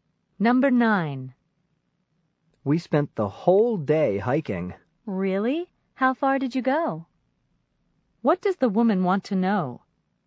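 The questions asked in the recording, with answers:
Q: What does the woman want to know?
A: How far they hiked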